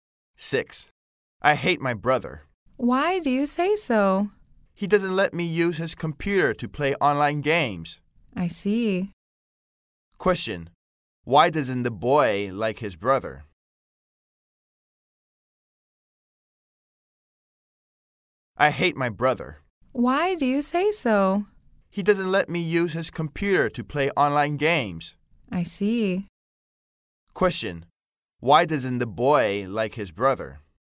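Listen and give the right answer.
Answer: He doesn't let him use his computer to play online games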